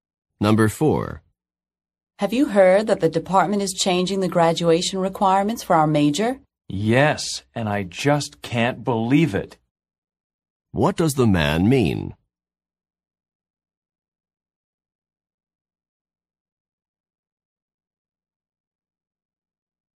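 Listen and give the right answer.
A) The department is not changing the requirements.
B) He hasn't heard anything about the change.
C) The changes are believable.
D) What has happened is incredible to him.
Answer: D) What has happened is incredible to him.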